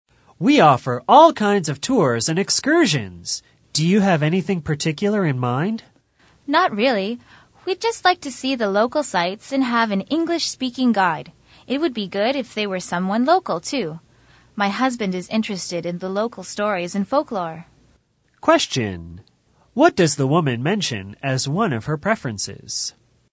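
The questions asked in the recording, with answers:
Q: What does the woman mention as one of her preferences?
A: An English-speaking local guide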